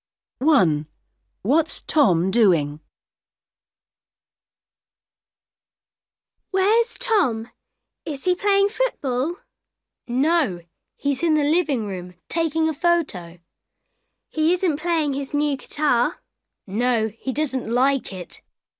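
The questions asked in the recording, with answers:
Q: What's Tom doing?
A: taking a photo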